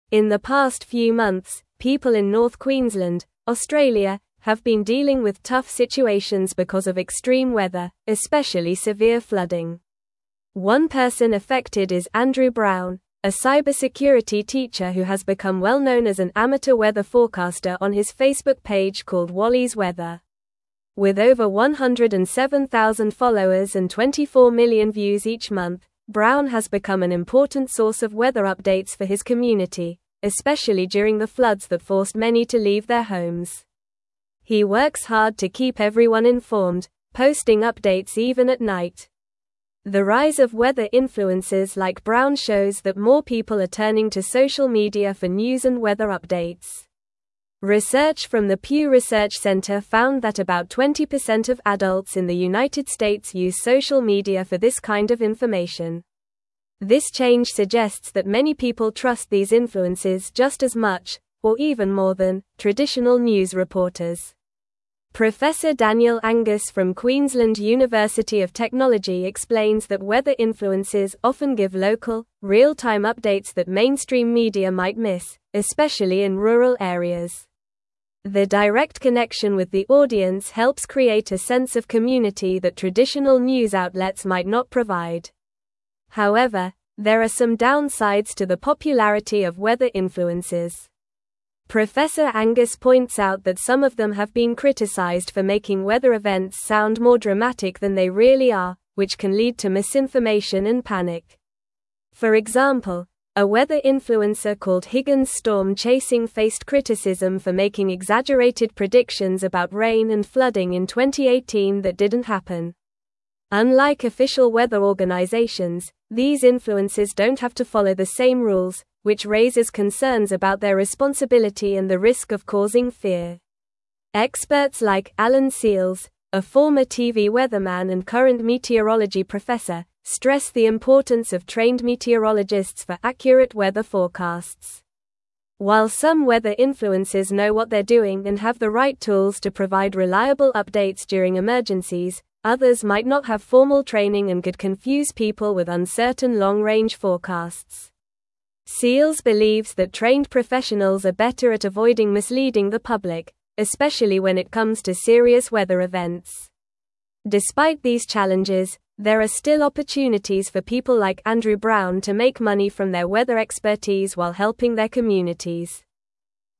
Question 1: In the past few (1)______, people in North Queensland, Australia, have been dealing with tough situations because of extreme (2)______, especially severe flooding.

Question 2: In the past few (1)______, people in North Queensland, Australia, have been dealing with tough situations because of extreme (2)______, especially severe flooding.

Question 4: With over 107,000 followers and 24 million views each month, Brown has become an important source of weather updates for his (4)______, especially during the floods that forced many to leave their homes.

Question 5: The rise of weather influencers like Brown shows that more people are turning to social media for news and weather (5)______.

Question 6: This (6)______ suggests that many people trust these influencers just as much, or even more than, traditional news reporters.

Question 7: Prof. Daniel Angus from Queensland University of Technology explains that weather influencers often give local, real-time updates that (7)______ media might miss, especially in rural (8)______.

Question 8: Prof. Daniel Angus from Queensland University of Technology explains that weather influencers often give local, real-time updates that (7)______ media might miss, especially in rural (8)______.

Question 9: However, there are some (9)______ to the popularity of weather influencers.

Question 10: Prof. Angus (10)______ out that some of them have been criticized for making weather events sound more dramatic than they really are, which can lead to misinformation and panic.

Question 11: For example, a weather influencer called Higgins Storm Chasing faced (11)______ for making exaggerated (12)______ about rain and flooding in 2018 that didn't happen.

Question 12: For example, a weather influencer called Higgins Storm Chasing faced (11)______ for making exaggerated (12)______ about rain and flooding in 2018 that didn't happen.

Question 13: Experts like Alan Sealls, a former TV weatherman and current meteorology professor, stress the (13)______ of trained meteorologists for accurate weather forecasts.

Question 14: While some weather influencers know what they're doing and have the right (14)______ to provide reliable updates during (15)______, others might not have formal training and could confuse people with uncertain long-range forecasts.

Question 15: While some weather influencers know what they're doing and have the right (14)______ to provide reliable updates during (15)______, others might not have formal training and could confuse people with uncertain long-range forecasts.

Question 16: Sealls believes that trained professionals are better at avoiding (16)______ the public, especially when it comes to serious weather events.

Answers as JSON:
{"1": "months", "2": "weather", "4": "community", "5": "updates", "6": "change", "7": "mainstream", "8": "areas", "9": "downsides", "10": "points", "11": "criticism", "12": "predictions", "13": "importance", "14": "tools", "15": "emergencies", "16": "misleading"}

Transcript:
In the past few months, people in North Queensland, Australia, have been dealing with tough situations because of extreme weather, especially severe flooding. One person affected is Andrew Brown, a cybersecurity teacher who has become well-known as an amateur weather forecaster on his Facebook page called Wally's Weather. With over 107,000 followers and 24 million views each month, Brown has become an important source of weather updates for his community, especially during the floods that forced many to leave their homes. He works hard to keep everyone informed, posting updates even at night.
The rise of weather influencers like Brown shows that more people are turning to social media for news and weather updates. Research from the Pew Research Centre found that about 20% of adults in the United States use social media for this kind of information. This change suggests that many people trust these influencers just as much, or even more than, traditional news reporters. Daniel Angus from Queensland University of Technology explains that weather influencers often give local, real-time updates that mainstream media might miss, especially in rural areas. Their direct connection with the audience helps create a sense of community that traditional news outlets might not provide.
However, there are some downsides to the popularity of weather influencers. Angus points out that some of them have been criticized for making weather events sound more dramatic than they really are, which can lead to misinformation and panic. For example, a weather influencer called Higgins Storm Chasing faced criticism for making exaggerated predictions about rain and flooding in 2018 that didn't happen. Unlike official weather organizations, these influencers don't have to follow the same rules, which raises concerns about their responsibility and the risk of causing fear.
Experts like Alan Sealls, a former TV weatherman and current meteorology professor, stress the importance of trained meteorologists for accurate weather forecasts. While some weather influencers know what they're doing and have the right tools to provide reliable updates during emergencies, others might not have formal training and could confuse people with uncertain long-range forecasts. Sealls believes that trained professionals are better at avoiding misleading the public, especially when it comes to serious weather events. Despite these challenges, there are still opportunities for people like Andrew Brown to make money from their weather expertise while helping their communities.

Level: Level 3